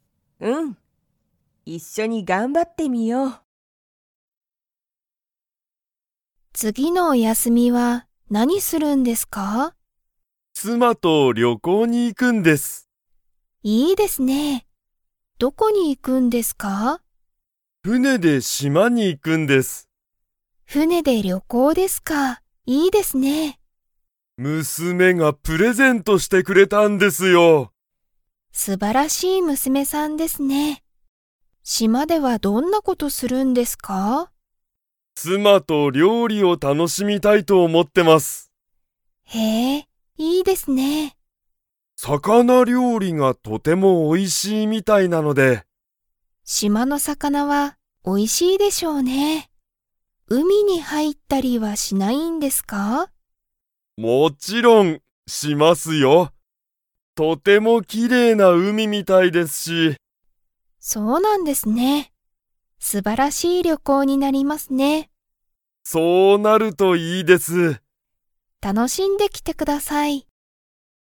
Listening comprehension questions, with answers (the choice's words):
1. 山田やまださんは、誰だれと旅行りょこうに行いきますか?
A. 佐藤さとうさん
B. 友達ともだち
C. 妻つま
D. 娘むすめ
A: 妻つま

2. 山田やまださんは、海うみに入はいったり 。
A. する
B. しない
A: する

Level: Level 3